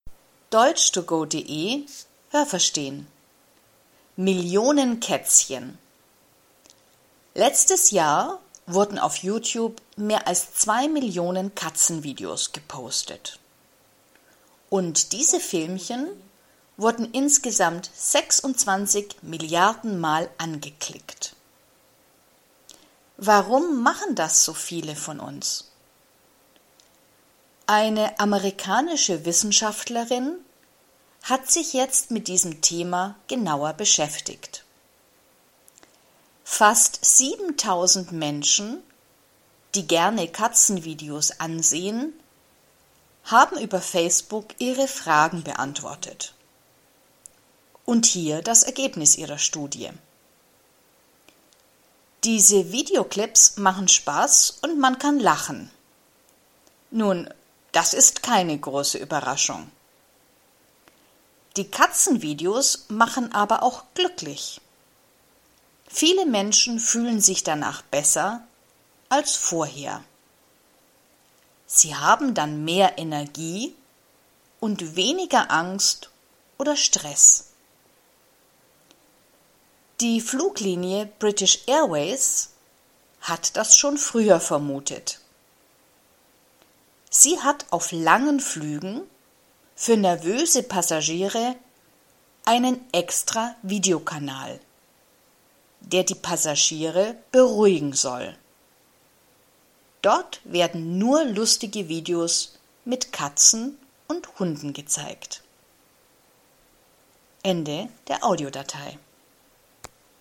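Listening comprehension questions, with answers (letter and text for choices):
Was haben Sie gehört? Es gibt nur eine korrekte Antwort.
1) Im letzten Jahr wurden _____ Katzenvideos gepostet.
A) 26 Milliarden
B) 2 Millionen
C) 62 Millionen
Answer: B) 2 Millionen

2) Wer hat Katzenvideos wissenschaftlich untersucht?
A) eine Wissenschaftlerin aus Amerika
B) ein Wissenschaftler aus Amerika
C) Facebook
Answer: A) eine Wissenschaftlerin aus Amerika

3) Wie viele Menschen hat die Wissenschaftlerin gefragt?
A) fast 70.000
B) fast 17.000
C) fast 7.000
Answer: C) fast 7.000

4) Wie war das Ergebnis der Studie?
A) Katzenvideos sind nur lustig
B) Katzenvideos sind lustig und machen glücklich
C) Katzenvideos machen Stress und manchmal Angst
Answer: B) Katzenvideos sind lustig und machen glücklich

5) Warum zeigt die Fluglinie „British Airways" lustige Katzen- und Hundevideos?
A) Sie macht das ohne besonderen Grund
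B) Sie will damit nervöse Passagiere beruhigen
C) Sie zeigt die Filme nur auf langen Flügen, damit die Passagiere sich nicht langweilen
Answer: B) Sie will damit nervöse Passagiere beruhigen

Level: A2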